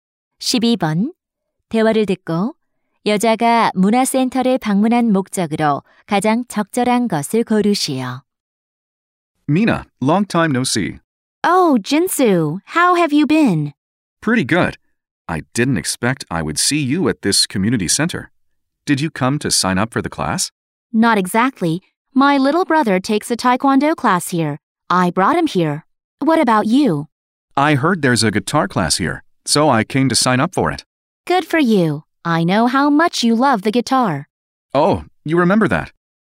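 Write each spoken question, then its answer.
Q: 대화를 듣고 여자가 문화센터를 방문한 목적으로 가장 적절한 것을 고르시오.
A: 남동생을 태권도 수업에 데려다 주려고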